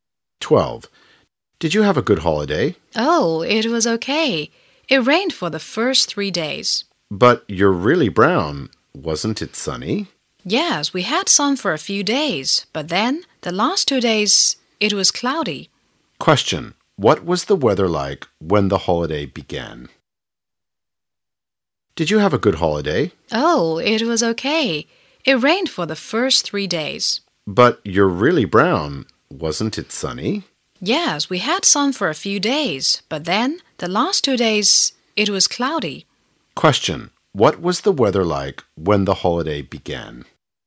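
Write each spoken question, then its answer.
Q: What was the weather like when the holiday began?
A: Rainy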